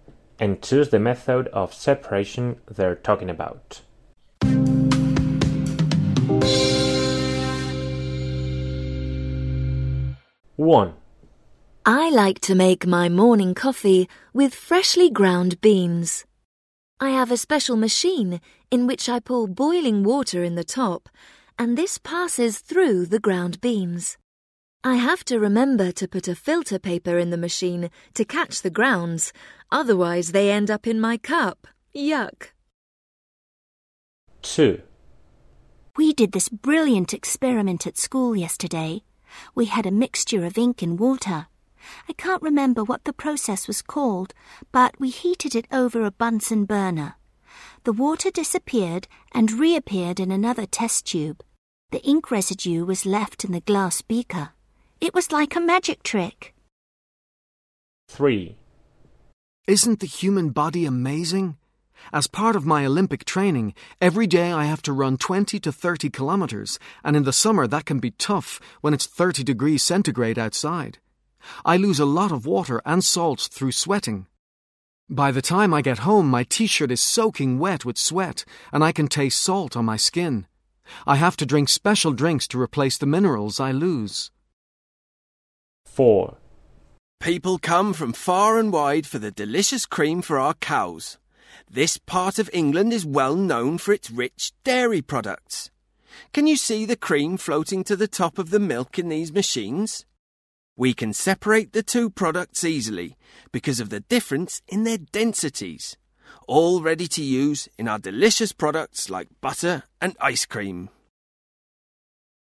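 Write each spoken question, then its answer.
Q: Listen and choose the method of separation they're talking about.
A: filtration

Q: Listen and choose the method of separation they're talking about.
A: distillation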